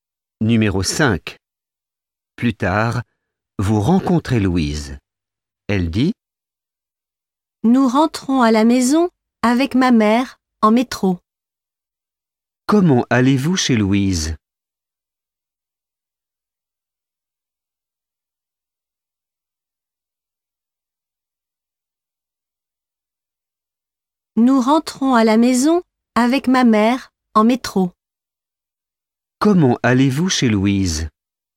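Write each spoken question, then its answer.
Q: Comment allez-vous chez Louise ?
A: En métro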